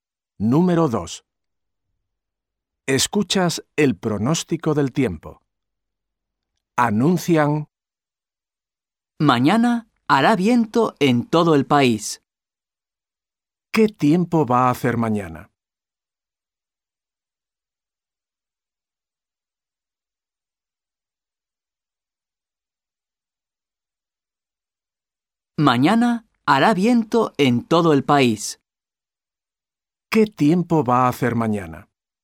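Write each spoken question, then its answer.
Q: ¿Qué tiempo va a hacer mañana?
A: Hará viento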